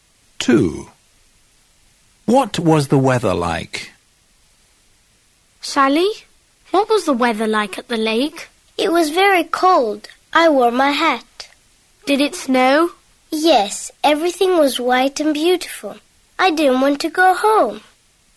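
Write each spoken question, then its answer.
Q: What was the weather like?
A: It was snowing / cold and snowy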